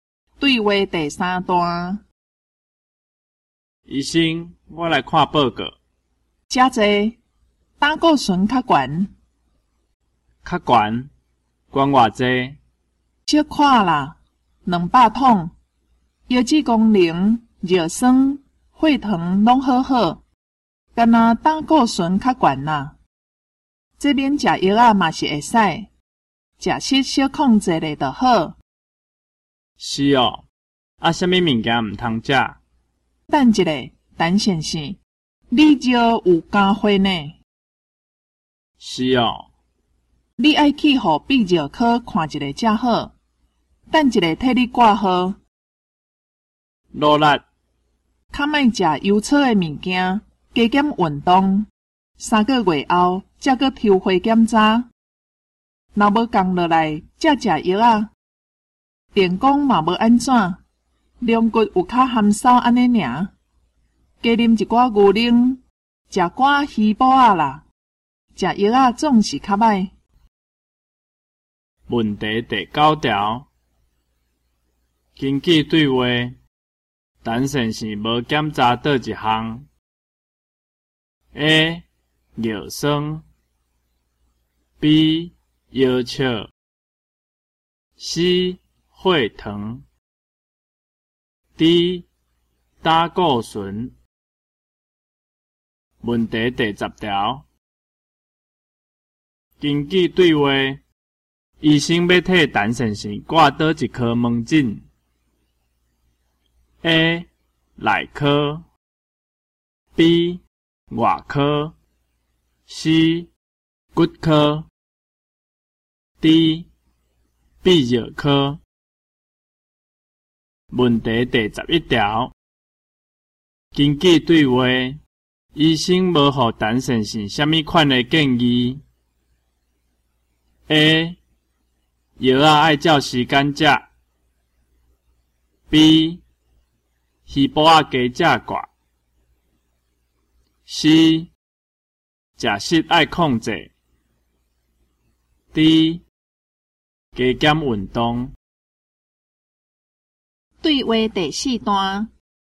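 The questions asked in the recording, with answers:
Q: 根据对话。医生要替陈先生挂倒一颗门诊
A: D: 泌尿科

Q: 根据对话,医生无予陈先生什么款的建议 ?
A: A: 药啊,爱照时间食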